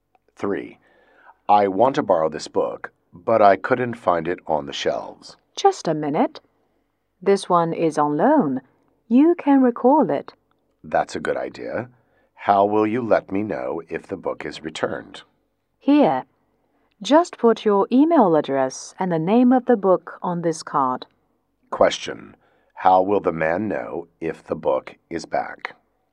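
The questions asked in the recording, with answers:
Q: How will the man know if the book is back?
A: By email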